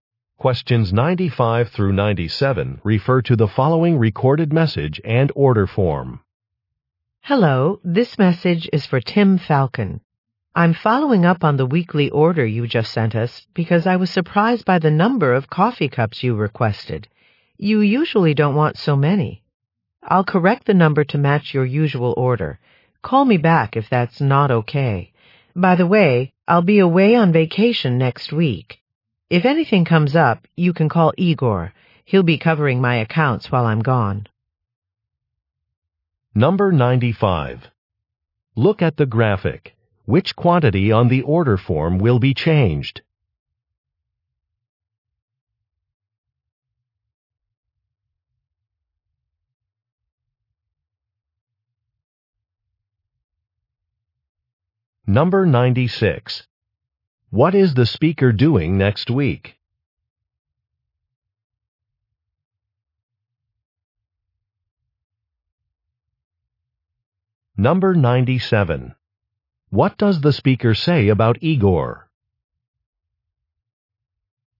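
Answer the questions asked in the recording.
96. Going on vacation
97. He will cover the speaker's accounts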